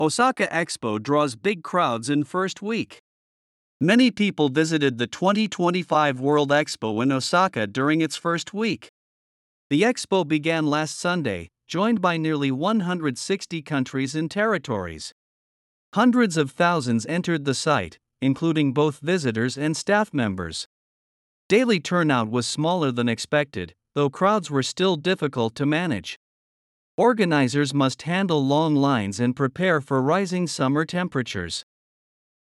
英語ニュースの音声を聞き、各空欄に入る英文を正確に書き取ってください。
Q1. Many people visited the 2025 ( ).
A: World Expo in Osaka during its first week

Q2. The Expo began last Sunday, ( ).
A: joined by nearly 160 countries and territories

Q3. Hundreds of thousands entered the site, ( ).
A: including both visitors and staff members

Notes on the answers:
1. 「during its」は弱音の機能語「its」が直前の単語とリンキングしているため、やや聞き取りにくい箇所です。
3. 「staff /stæf/」と「stuff /stʌf/」の母音の違いに注意しましょう。また、「staff(スタッフ)」にしないと文脈に合わないため、読解力が必要です。

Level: 中級脱出